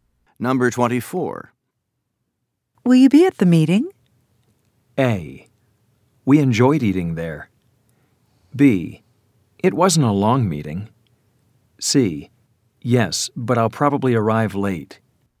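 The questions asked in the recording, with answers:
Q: Will you be at the meeting?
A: C: Yes, but I'll probably arrive late.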